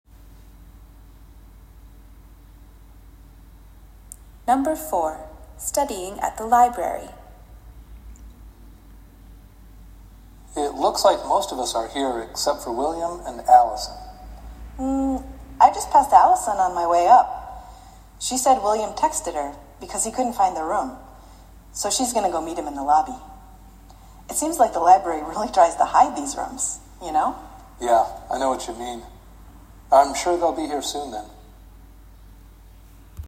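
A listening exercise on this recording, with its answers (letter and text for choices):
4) Why have William and Alison NOT joined the group yet?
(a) Alison did not know about the meeting.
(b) They did not want to meet at the library.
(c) William could not find the meeting place.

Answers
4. (c) William could not find the meeting place.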